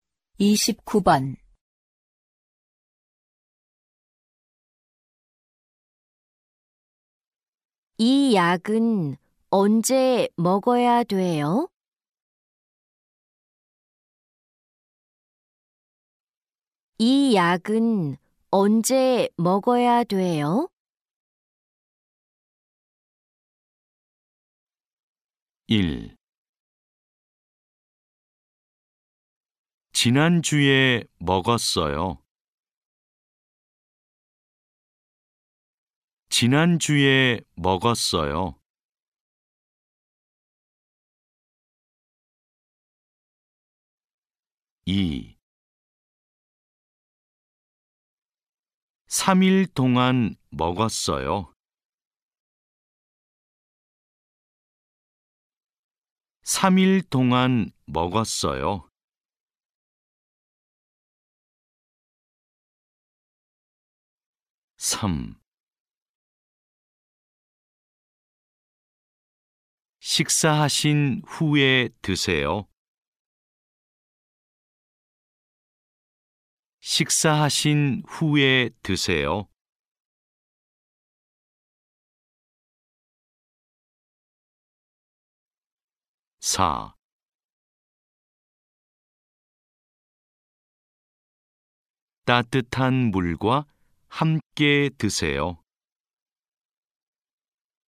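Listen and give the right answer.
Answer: 3: 식사하신 후에 드세요.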